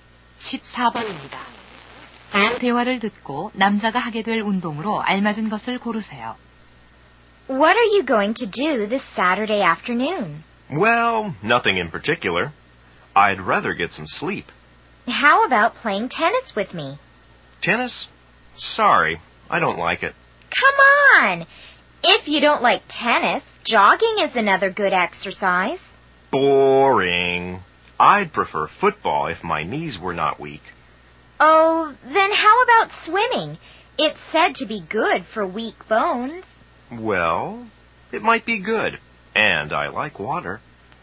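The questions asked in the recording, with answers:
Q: 다음 대화를 듣고 남자가 하게 될 운동으로 알맞은 것을 고르세요.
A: 수영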